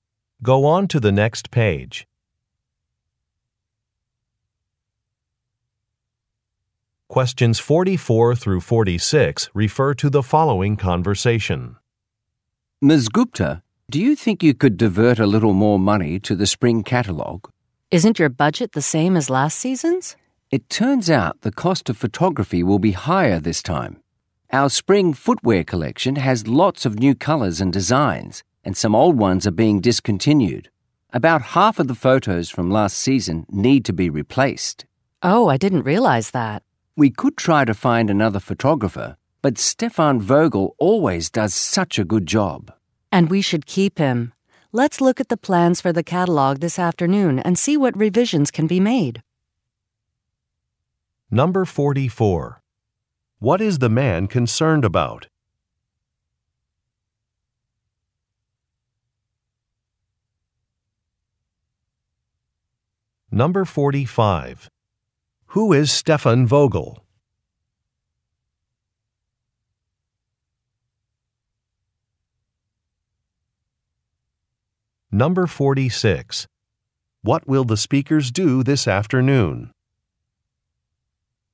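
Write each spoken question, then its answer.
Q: What is the man concerned about?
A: The higher cost of photography for the spring catalogue

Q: Who is Stefan Vogel?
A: A photographer

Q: What will the speakers do this afternoon?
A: Look at the catalogue plans and see what revisions can be made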